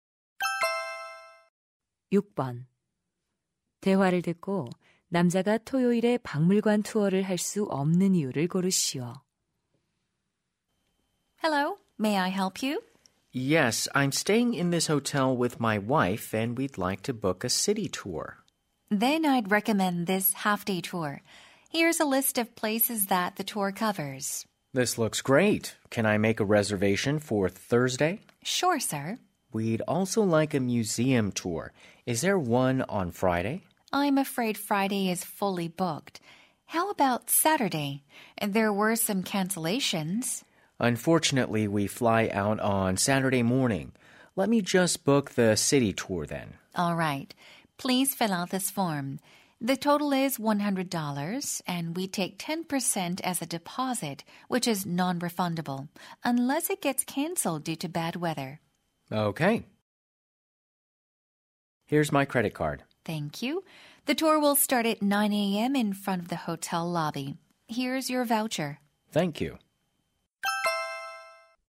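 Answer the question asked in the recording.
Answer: 토요일 아침에 비행기로 떠나야 해서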